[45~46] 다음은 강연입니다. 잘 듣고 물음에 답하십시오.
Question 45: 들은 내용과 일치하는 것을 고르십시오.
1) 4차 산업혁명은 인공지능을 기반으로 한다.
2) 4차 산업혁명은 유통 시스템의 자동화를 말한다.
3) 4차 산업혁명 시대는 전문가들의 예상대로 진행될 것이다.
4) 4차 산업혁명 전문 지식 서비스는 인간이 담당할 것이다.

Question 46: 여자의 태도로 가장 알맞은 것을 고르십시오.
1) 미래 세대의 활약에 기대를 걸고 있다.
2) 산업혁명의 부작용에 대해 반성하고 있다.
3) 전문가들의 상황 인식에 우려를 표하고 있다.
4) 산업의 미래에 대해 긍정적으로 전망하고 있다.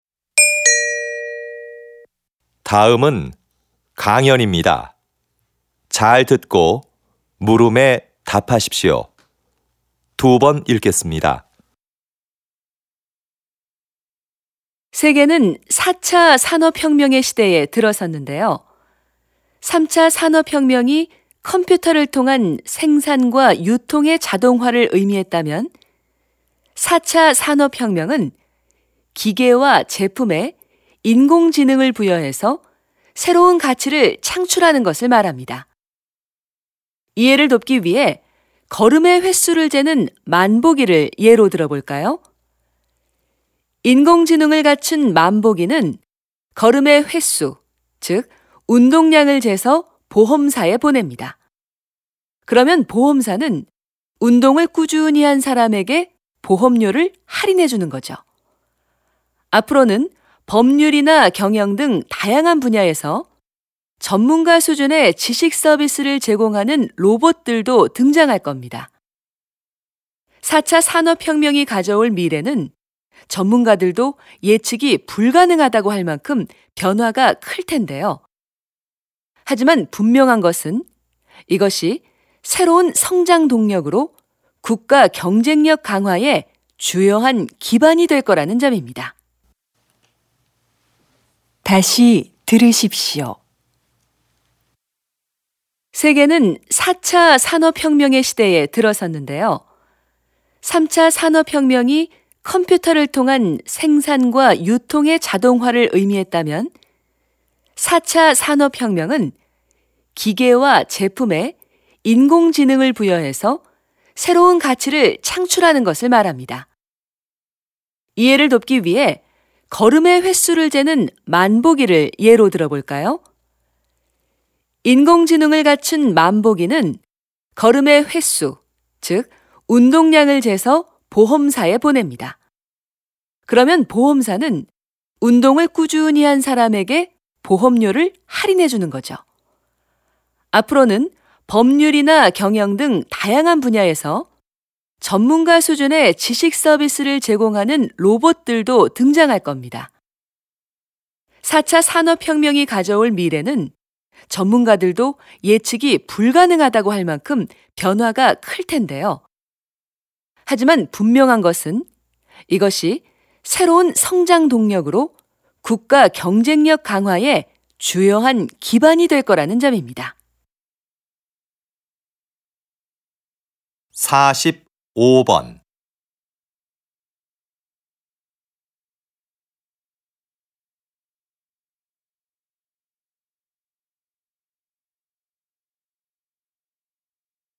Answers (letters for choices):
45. 1
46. 4

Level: TOPIK II